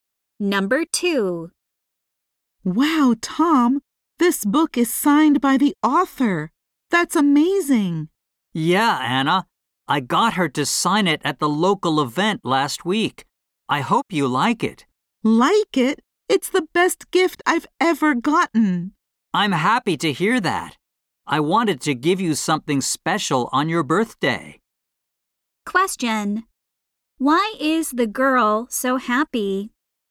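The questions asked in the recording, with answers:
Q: Why is the girl so happy?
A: She got a book signed by the author as a birthday gift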